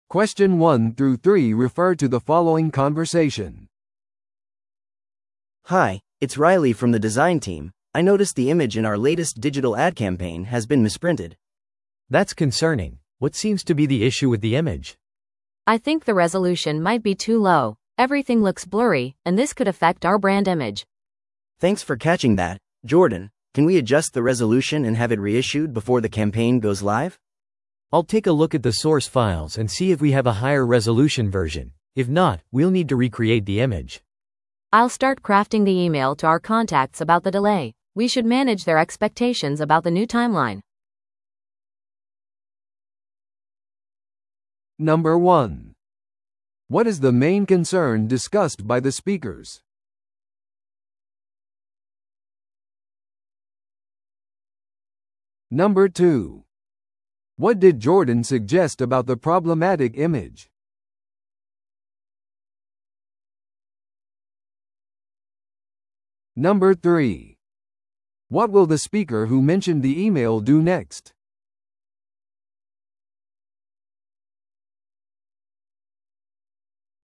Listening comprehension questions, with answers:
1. What is the main concern discussed by the speakers?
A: 広告キャンペーンの誤印刷された画像

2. What did Jordan suggest about the problematic image?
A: より高い解像度のバージョンを確認する

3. What will the speaker who mentioned the email do next?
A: 遅延についての通知案を起草する

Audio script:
A: Hi, it's Riley from the design team. I noticed the image in our latest digital ad campaign has been misprinted.
B: That's concerning. What seems to be the issue with the image?
C: I think the resolution might be too low. Everything looks blurry, and this could affect our brand image.
A: Thanks for catching that, Jordan. Can we adjust the resolution and have it reissued before the campaign goes live?
B: I'll take a look at the source files and see if we have a higher-resolution version. If not, we'll need to recreate the image.
C: I'll start crafting the email to our contacts about the delay. We should manage their expectations about the new timeline.